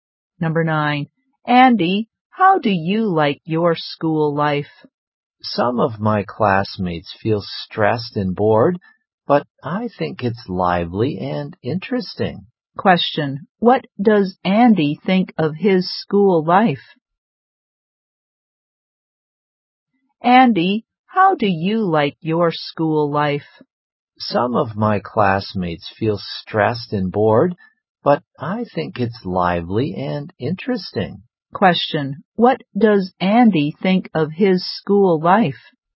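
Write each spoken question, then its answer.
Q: What does Andy think of his school life?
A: Lively and interesting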